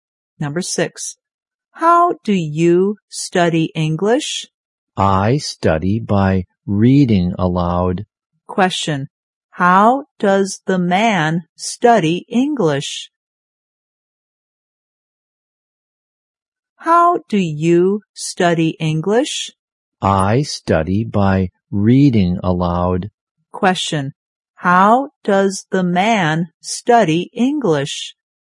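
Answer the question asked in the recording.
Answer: By reading aloud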